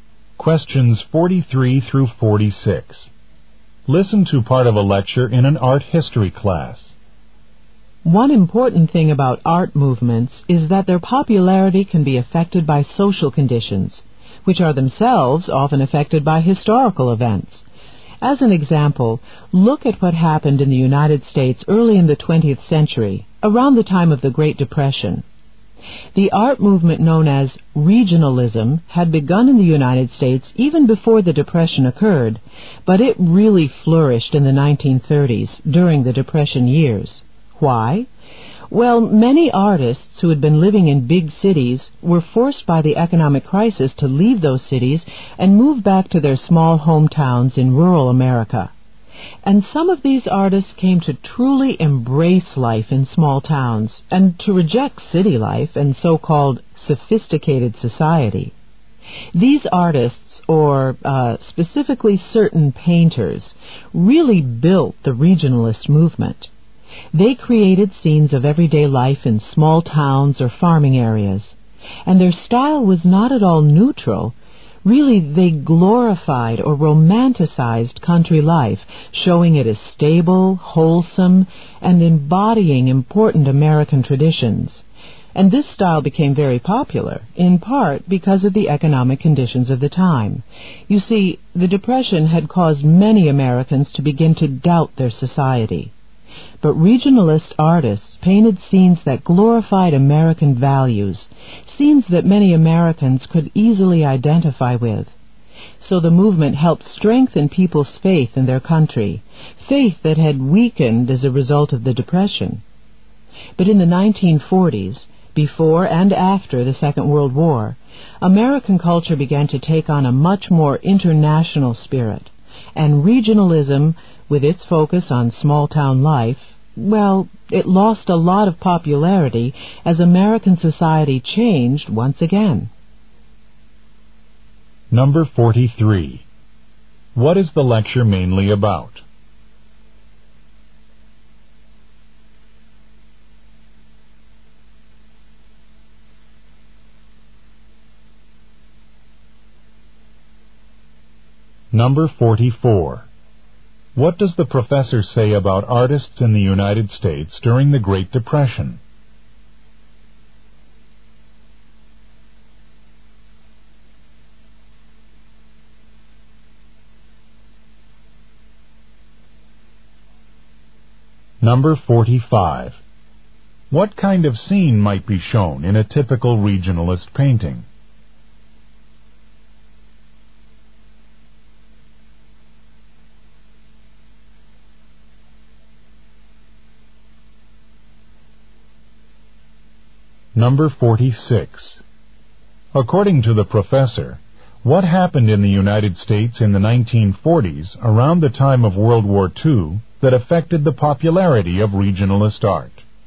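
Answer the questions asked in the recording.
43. How social conditions affected the popularity of regionalism.
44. Many moved from big cities back to small hometowns.
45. Everyday life in a small town or farm area.
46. American culture became more international.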